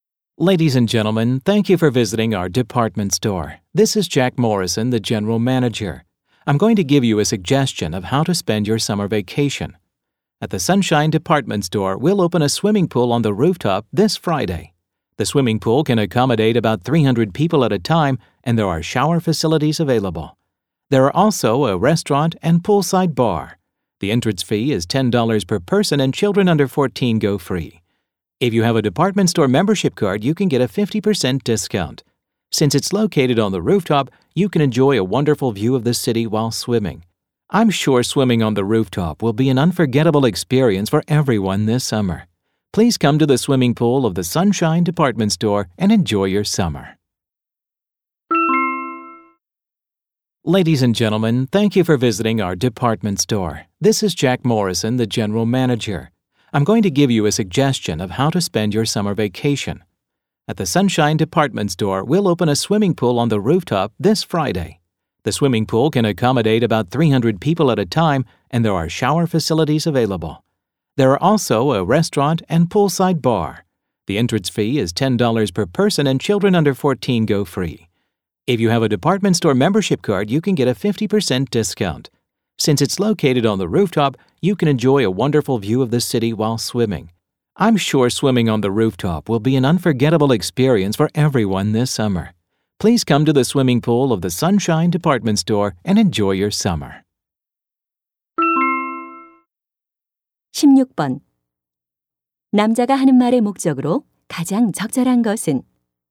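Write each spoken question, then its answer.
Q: 남자가 하는 말의 목적으로 가장 적절한 것은?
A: 백화점 옥상 수영장 개장을 홍보하려고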